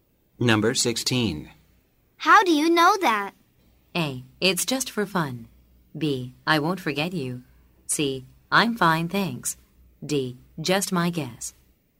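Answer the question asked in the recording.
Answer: D: Just my guess.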